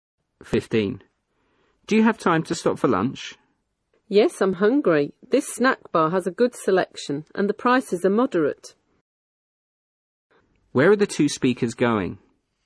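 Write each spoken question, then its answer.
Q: Where are the 2 speakers going?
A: To a snack bar for lunch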